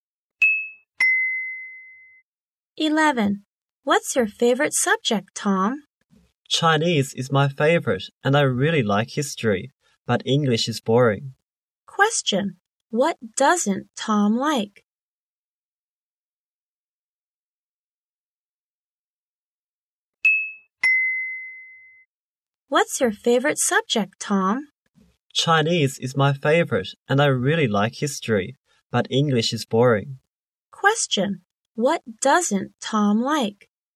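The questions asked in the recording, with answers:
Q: Question: What doesn't Tom like?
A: English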